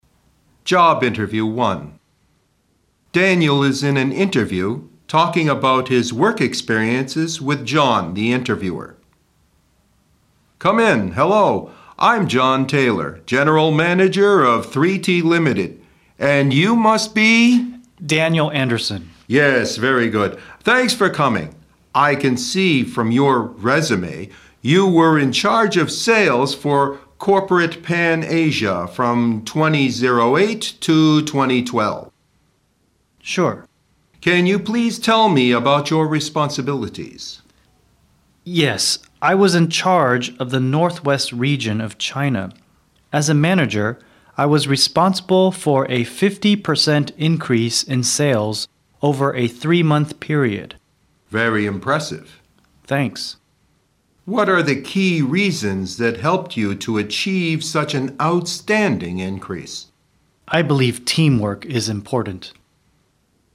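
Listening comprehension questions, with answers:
二、请听下面的对话,根据对话内容进行判断,正确为"T",错误为"F"。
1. Daniel invited John to the job interview.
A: F

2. Daniel worked in Corporate Pan-Asia for 6 years.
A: F

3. Daniel was in charge of the southwest region of Canada.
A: F

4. A 50% increase in sales over a three-month period proved Daniel a good manager.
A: T

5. Teamwork helped Daniel achieve an outstanding increase.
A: T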